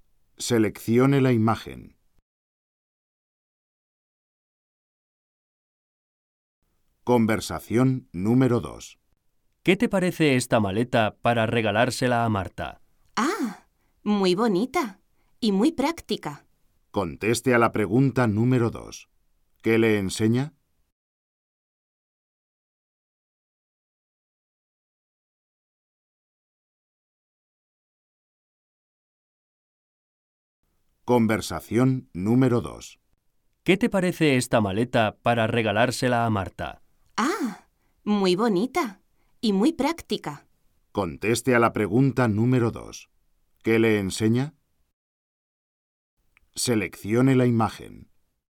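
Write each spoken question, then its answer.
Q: ¿Qué le enseña?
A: Una maleta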